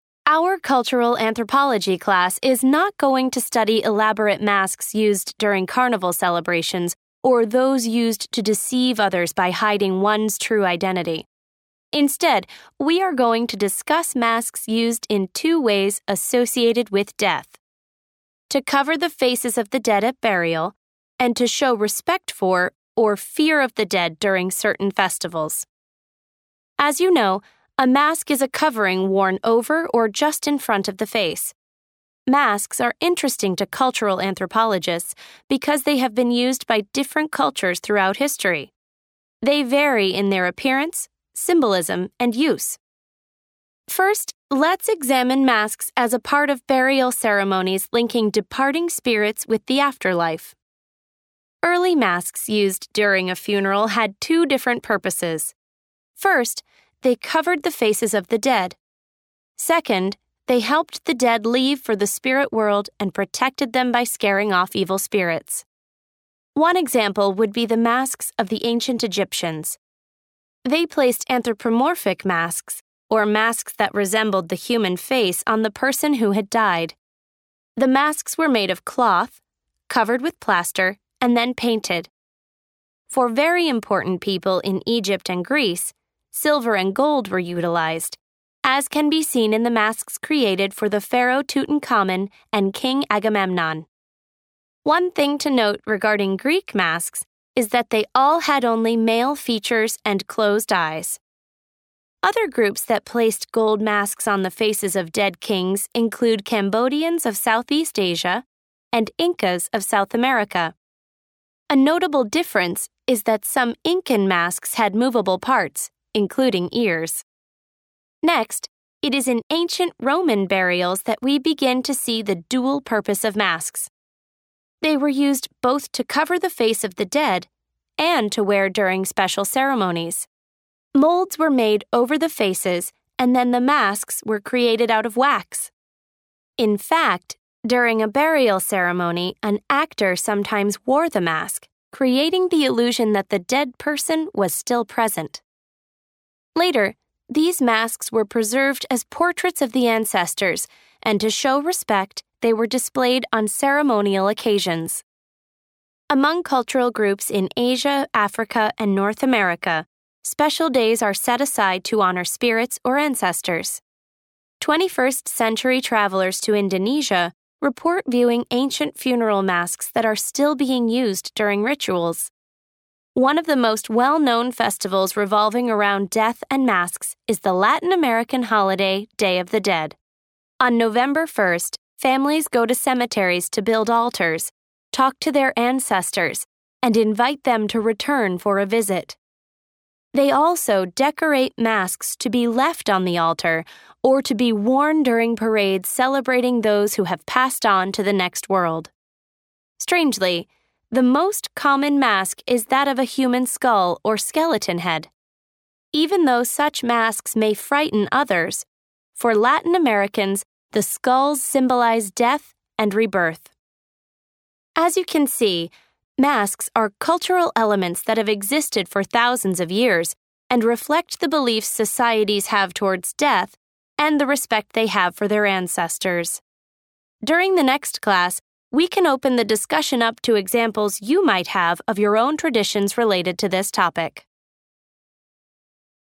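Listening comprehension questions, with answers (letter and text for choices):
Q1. What is the main purpose of this lecture?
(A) to provide a history of death rituals and funeral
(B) to describe death masks and their uses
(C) to explain differences between death ceremonies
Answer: (B) to describe death masks and their uses

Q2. What does anthropomorphic mean?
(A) resembling the dead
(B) resembling humans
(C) resembling animals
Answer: (B) resembling humans

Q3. Which culture's masks had closed eyes and male features?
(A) Roman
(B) Egyptian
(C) Greek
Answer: (C) Greek

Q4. What was NOT characteristic of the Incan masks for kings?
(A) they were made of cloth and then painted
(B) they had moving parts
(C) they were made of gold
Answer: (A) they were made of cloth and then painted

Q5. What is special about masks for the Day of the Dead?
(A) masks of human skulls are placed on altars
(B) actors wear masks of the dead during burial ceremonies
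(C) masks of ancestors' faces hang in houses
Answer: (A) masks of human skulls are placed on altars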